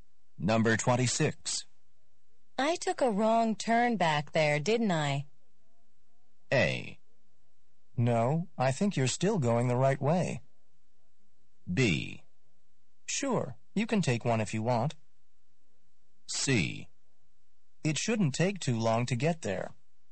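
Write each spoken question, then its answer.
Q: I took a wrong turn back there, didn't I?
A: A: No, I think you're still going the right way.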